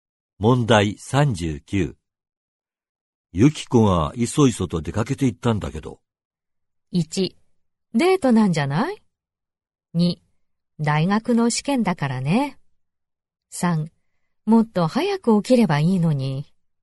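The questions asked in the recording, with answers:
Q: ゆき子がいそいそと出かけて行ったんだけど。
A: 1: デートなんじゃない?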